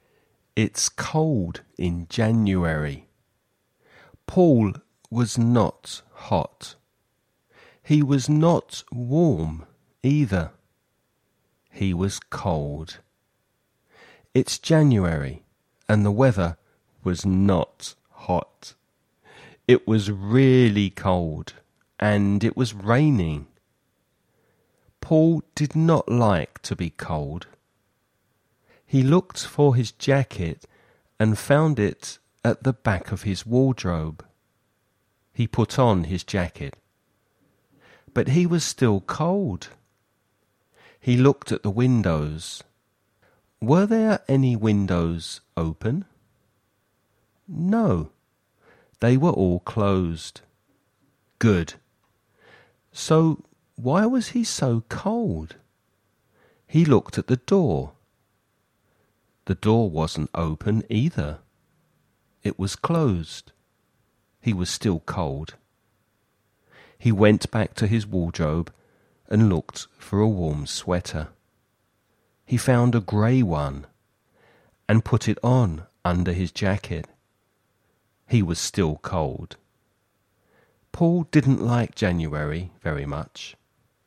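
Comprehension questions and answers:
Escucha y contesta las siguientes preguntas.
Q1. What was the weather like?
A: It was really cold and it was raining.

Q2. What did Paul put on first?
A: His jacket.

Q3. Where did Paul keep his clothes?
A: In his wardrobe.

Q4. What was the second thing that Paul put on?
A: A grey sweater.

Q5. Did Paul get warm?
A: No, he was still cold.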